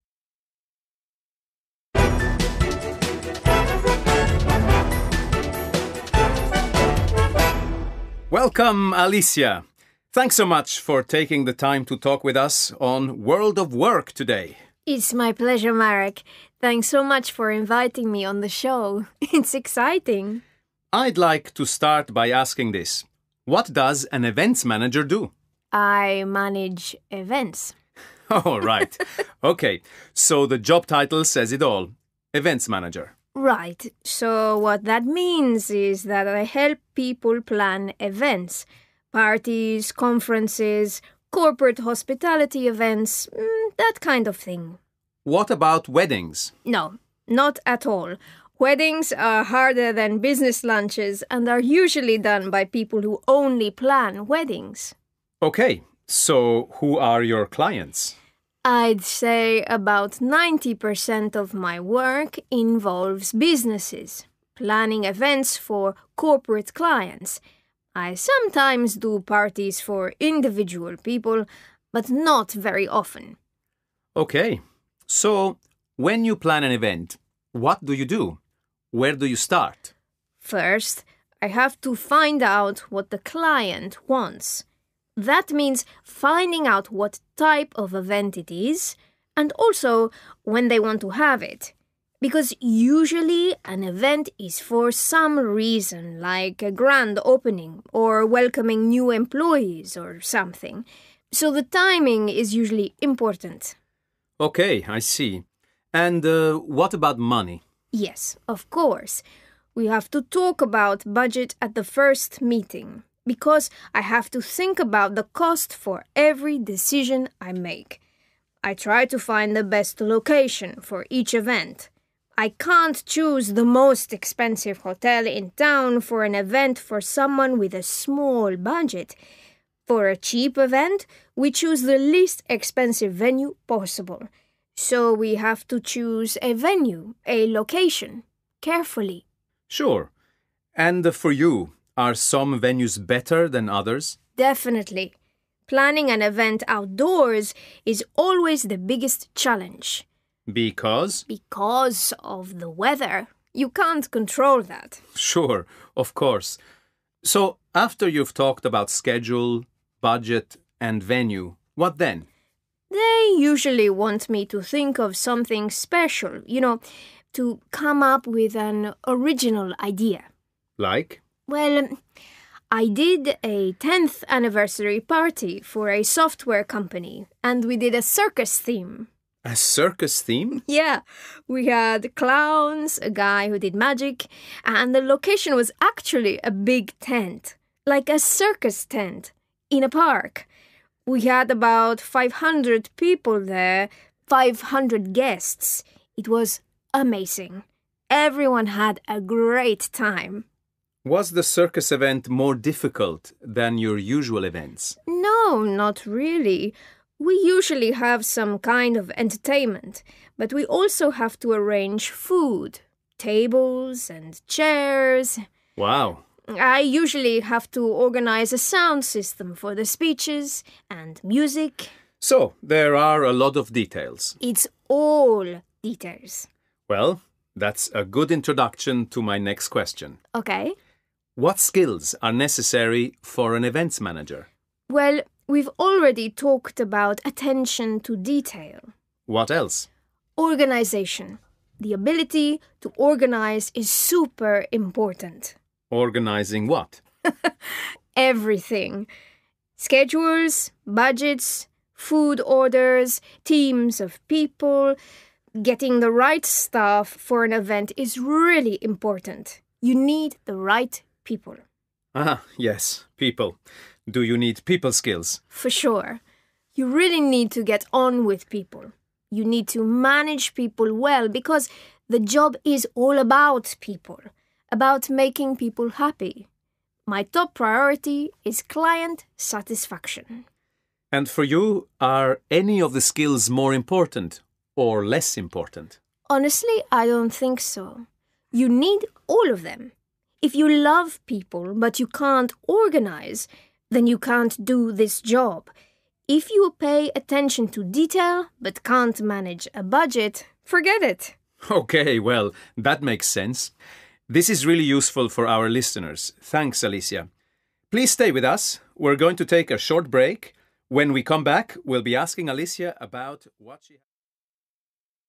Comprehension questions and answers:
B. Listen again and decide if these sentences are true (T) or false (F). Correct the incorrect sentences.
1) She helps people plan weddings.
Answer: F

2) Most of her clients are businesses.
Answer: T

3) In the first meeting, she never talks to clients about money.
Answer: F

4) She says that planning a big event is like planning a circus.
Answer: F

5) She believes that getting details right is very important.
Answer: T

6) She says her job is to make her clients happy.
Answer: T

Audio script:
A: Welcome, Alicia. Thanks so much for taking the time to talk with us on World of Work today.
B: It's my pleasure, Marek. Thanks so much for inviting me on the show. It's exciting!
A: I'd like to start by asking this: What does an Events Manager do?
B: I manage events ...
A: Oh, right – OK, so the job title says it all: Events Manager.
B: Right. So what that means is that I help people plan events: parties, conferences, corporate hospitality events – that kind of thing.
A: What about weddings?
B: No – not at all. Weddings are harder than business lunches and are usually done by people who only plan weddings.
A: OK, so who are your clients?
B: I'd say about ninety percent of my work involves businesses – planning events for corporate clients. I sometimes do parties for individual people, but not very often.
A: OK. So when you plan an event, what do you do? Where do you start?
B: First, I have to find out what the client wants. That means finding out what type of event it is, and also when they want to have it. Because usually, an event is for some reason, like a grand opening, or welcoming new employees or something – so the timing is usually important.
A: OK, I see. And what about money?
B: Yes, of course. We have to talk about budget at the first meeting, because I have to think about the cost for every decision I make. I try to find the best location for each event. I can't choose the most expensive hotel in town for an event for someone with a small budget. For a cheap event, we choose the least expensive venue possible. So we have to choose a venue – a location – carefully.
A: Sure. And for you, are some venues better than others?
B: Definitely. Planning an event outdoors is always the biggest challenge.
A: Because ...
B: Because of the weather. You can't control that!
A: Sure, of course. So after you've talked about schedule, budget and venue, what then?
B: They usually want me to think of something special – you know, to come up with an original idea.
A: Like ...
B: Well, I did a tenth anniversary party for a software company, and we did a circus theme.
A: A circus theme?
B: Yeah – we had clowns, a guy who did magic – and the location was actually a big tent – like a circus tent – in a park. We had about five hundred people there – five hundred guests. It was amazing. Everyone had a great time.
A: Was the circus event more di‐ cult than your usual events?
B: No, not really. We usually have some kind of entertainment, but we also have to arrange food, tables and chairs ...
A: Wow.
B: I usually have to organise a sound system for the speeches and music ...
A: So there are a lot of details.
B: It's all details!
A: Well, that's a good introduction to my next question.
A: What skills are necessary for an Events Manager?
B: Well, we've already talked about attention to detail.
A: What else?
B: Organisation – the ability to organise is super important.
B: Everything: Schedules, budgets, food orders, teams of people ... Getting the right staff for an event is really important – you need the right people.
A: Ah, yes, people. Do you need people skills?
B: For sure. You really need to get on with people – you need to manage people well, because the job is all about people – about making people happy. My top priority is client satisfaction.
A: And for you, are any of the skills more important – or less important?
B: Honestly, I don't think so. You need all of them. If you love people but you can't organise, then you can't do this job. If you pay attention to detail but can't manage a budget – forget it!
A: OK, well, that makes sense. This is really useful for our listeners, thanks Alicia. Please stay with us. We're going to take a short break. When we come back, we'll be asking Alicia about ...